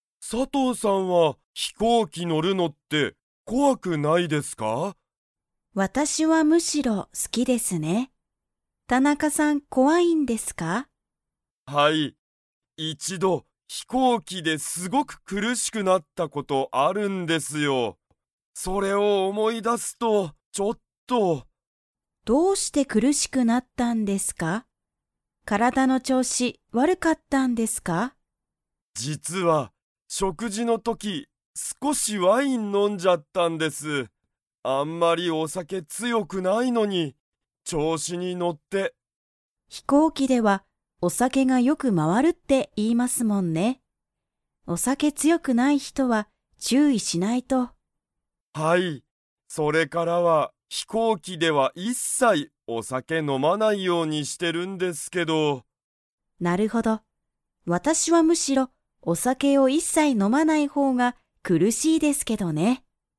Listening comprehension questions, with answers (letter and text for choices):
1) 田中たなかさんは一度いちど、飛行機ひこうきで ことがある。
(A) 楽たのしくなった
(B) 悲かなしくなった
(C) 強つよくなった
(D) 苦くるしくなった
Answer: (D) 苦くるしくなった

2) 飛行機ひこうきではお酒さけが 。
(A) よく回まわる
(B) おいしい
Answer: (A) よく回まわる

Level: Level 4